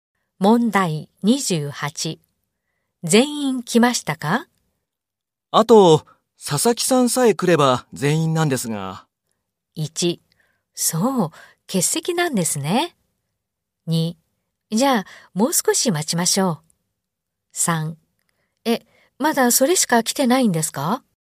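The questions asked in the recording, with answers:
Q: あと、佐々木さんさえ来れば全員なんですが。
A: 2: じゃあ、もう少し待ちましょう。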